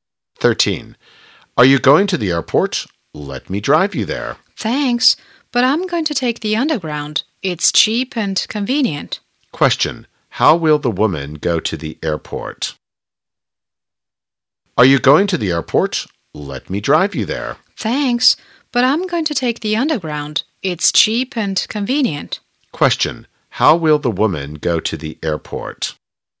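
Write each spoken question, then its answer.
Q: how will the woman go to the airport?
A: By underground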